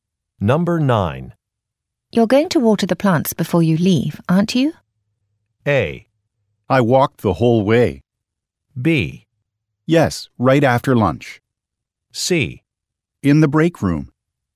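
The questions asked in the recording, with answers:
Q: You're going to water the plants before you leave, aren't you?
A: B: Yes, right after lunch.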